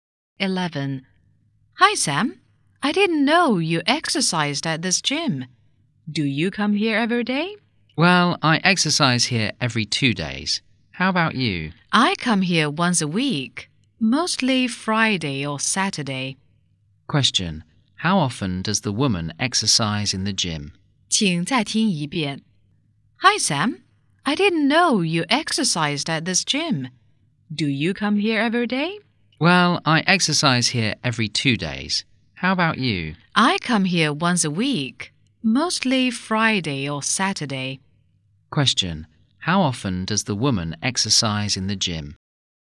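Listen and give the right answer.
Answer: Once a week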